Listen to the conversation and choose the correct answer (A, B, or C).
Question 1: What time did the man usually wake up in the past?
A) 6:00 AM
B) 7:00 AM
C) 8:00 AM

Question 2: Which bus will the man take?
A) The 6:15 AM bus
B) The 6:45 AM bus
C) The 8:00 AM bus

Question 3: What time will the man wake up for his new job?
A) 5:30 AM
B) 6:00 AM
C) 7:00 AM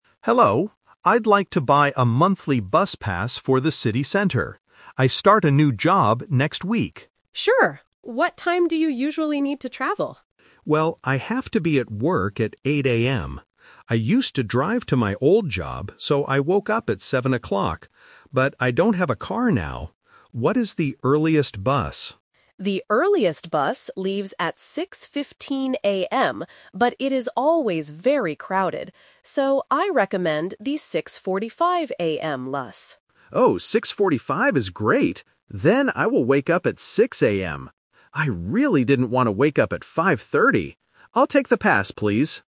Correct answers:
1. B
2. B
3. B

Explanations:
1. The man says, "I used to drive to my old job, so I woke up at 7:00." Option A (6:00 AM) is a trap because it is his new wake-up time. Option C (8:00 AM) is a trap because it is the time he starts work.
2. The agent recommends the 6:45 AM bus, and the man agrees ("Oh, 6:45 is great"). Option A (The 6:15 AM bus) is a trap because it is the earliest bus, but he rejects it because the agent says it is too crowded. Option C is a trap because 8:00 AM is his work time, not the bus time.
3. The man decides, "Then I will wake up at 6:00 AM." Option A (5:30 AM) is a trap because he mentions it, but only to say he didn't want to wake up that early. Option C (7:00 AM) is his old habit.

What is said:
Passenger: Hello, I'd like to buy a monthly bus pass for the city center. I start a new job next week.
Agent: Sure. What time do you usually need to travel?
Passenger: Well, I have to be at work at 8:00 AM. I used to drive to my old job, so I woke up at 7:00. But I don't have a car now. What is the earliest bus?
Agent: The earliest bus leaves at 6:15 AM, but it is always very crowded. So, I recommend the 6:45 AM bus.
Passenger: Oh, 6:45 is great. I really didn't want to wake up at 5:30! I'll take the pass, please.

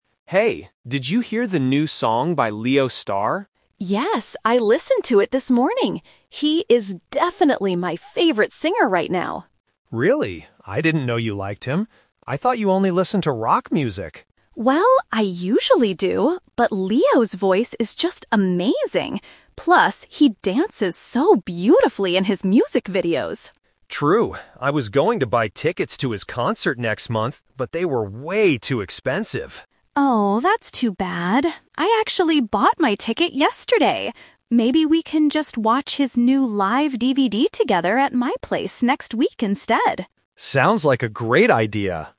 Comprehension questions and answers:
Listen to the conversation between two friends. Choose the correct answer (A, B, or C) for each question.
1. Why does the woman like the singer Leo Star?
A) Because he sings rock music.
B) Because he has an amazing voice and dances well.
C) Because his concert tickets are cheap.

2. What was the man planning to do?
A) Buy tickets to Leo Star's concert.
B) Buy a new live DVD.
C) Go to a rock music festival.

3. What are the two friends going to do together?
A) Go to the concert next month.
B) Listen to some rock music.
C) Watch a DVD at the woman's house.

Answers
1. B
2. A
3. C

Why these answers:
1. The woman says, "Leo's voice is just amazing" and "he dances so beautifully." Option (A) is a trap because the man thought she only liked rock music, but Leo Star is a different case. Option (C) is incorrect because the tickets were "way too expensive," not cheap.
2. The man says, "I was going to buy tickets to his concert... but they were way too expensive." This uses the "but" twist common in A2 levels. Option (B) is a trap; the woman suggests watching a DVD, but the man wasn't planning to buy one. Option (C) is a trap using the word "rock" mentioned earlier.
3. The woman offers a solution since the man couldn't buy a ticket: "Maybe we can just watch his new live DVD together at my place." The man agrees ("Sounds like a great idea!"). Option (A) is a trap because only the woman is going to the concert. Option (B) is just a distraction using a keyword from the beginning of the conversation.

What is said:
Man: Hey, did you hear the new song by Leo Star?
Woman: Yes, I listened to it this morning! He is definitely my favorite singer right now.
Man: Really? I didn't know you liked him. I thought you only listened to rock music.
Woman: Well, I usually do, but Leo's voice is just amazing. Plus, he dances so beautifully in his music videos.
Man: True. I was going to buy tickets to his concert next month, but they were way too expensive.
Woman: Oh, that's too bad. I actually bought my ticket yesterday! Maybe we can just watch his new live DVD together at my place next week instead.

